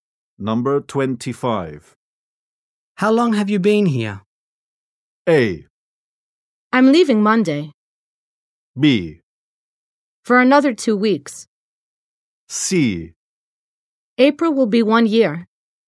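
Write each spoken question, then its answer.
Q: How long have you been here?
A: C: April will be 1 year.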